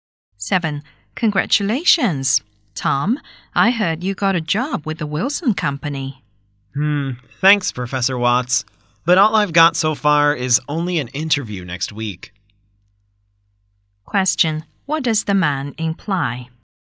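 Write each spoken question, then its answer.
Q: What does the man imply?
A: He hasn't got the job yet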